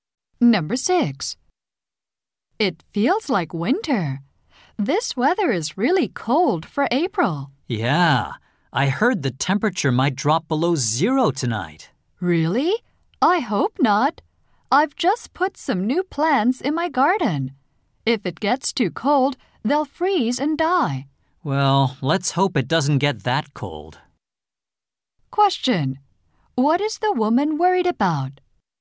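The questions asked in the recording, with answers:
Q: What is the woman worried about?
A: Her new plants may freeze and die.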